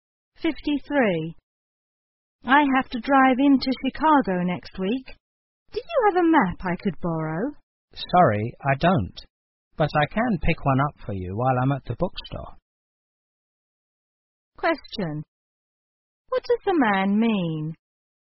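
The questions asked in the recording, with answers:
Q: What does the man mean?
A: He will get a map for the woman at the bookstore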